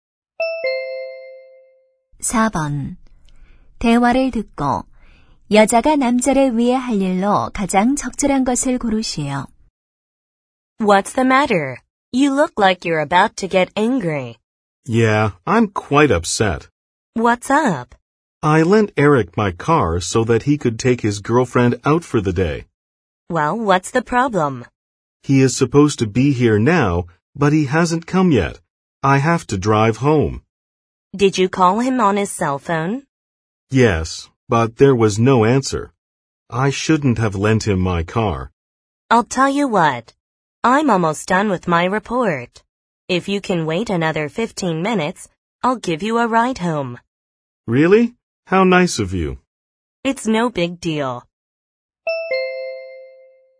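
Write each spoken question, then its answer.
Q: 대화를 듣고 여자가 남자를 위해 할 일로 가장 적절한 것을 고르시오.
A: 남자를 집까지 차로 태워다 주기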